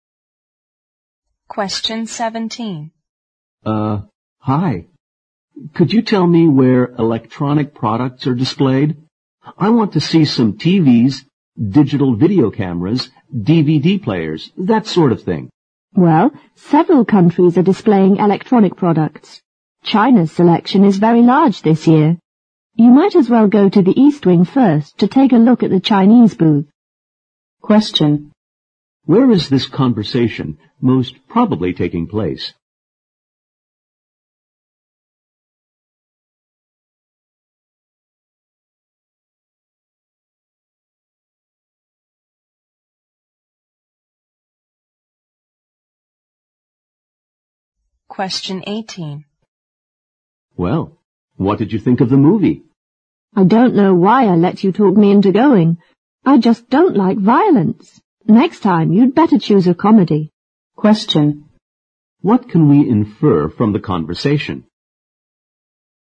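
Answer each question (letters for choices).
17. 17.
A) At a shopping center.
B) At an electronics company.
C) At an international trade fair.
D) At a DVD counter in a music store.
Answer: C

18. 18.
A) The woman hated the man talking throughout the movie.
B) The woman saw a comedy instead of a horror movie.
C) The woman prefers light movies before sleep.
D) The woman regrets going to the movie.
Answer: D

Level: 六级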